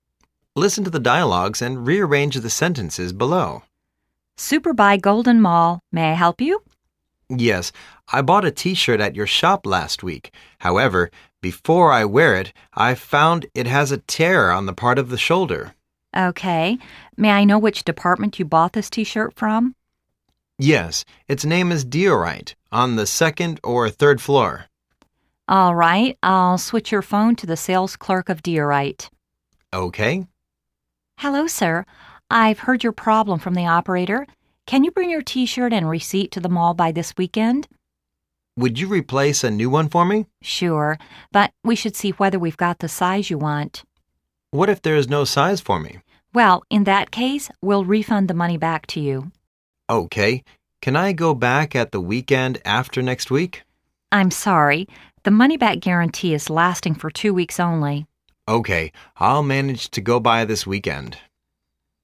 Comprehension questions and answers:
Listen to the dialogues and rearrange the sentences below.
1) Would you replace a new one for me?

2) lts name is "Diorite", on the second or third floor_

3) Okay...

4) Okay, I'II manage to go by this weekend.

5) What if there's no size for me.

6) I bought a T-shirt at your shop last week. However, before I wear it I found it has a tear on the part of shoulder.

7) Okay. Can I go back at the weekend after next week?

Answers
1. 4
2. 2
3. 3
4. 7
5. 5
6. 1
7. 6